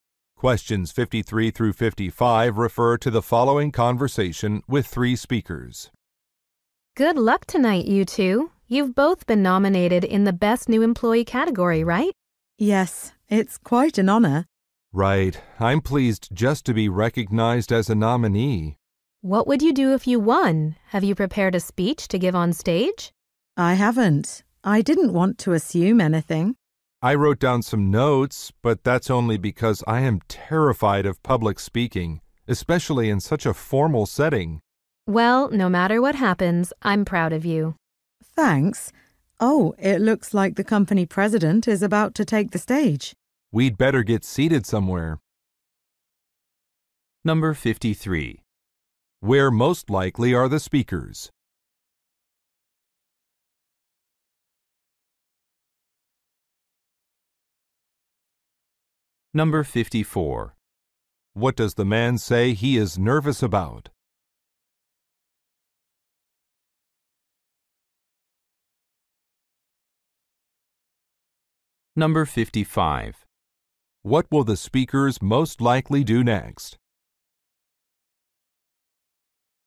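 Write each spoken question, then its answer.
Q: Where most likely are the speakers?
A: At a company awards ceremony

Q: What will the speakers most likely do next?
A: Find seats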